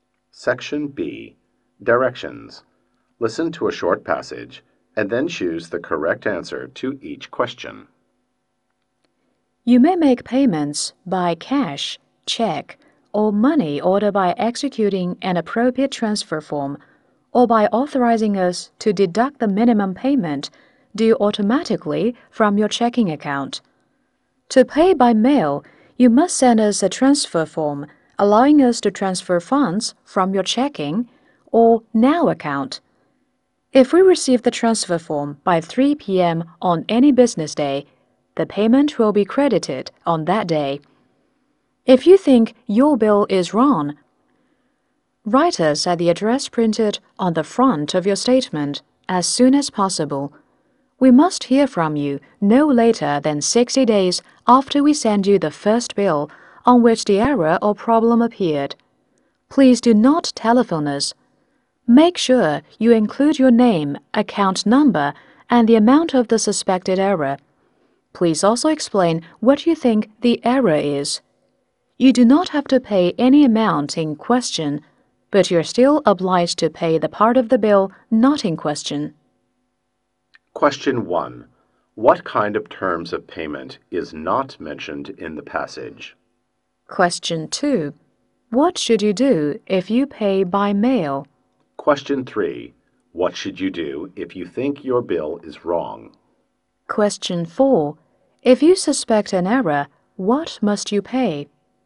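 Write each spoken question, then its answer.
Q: What should you do if you pay by mail?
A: Send a transfer form allowing them to transfer funds from your checking or NOW account

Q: What should you do if you think your bill is wrong?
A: Write to them at the address on the front of the statement as soon as possible

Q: If you suspect an error, what must you pay?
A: The part of the bill not in question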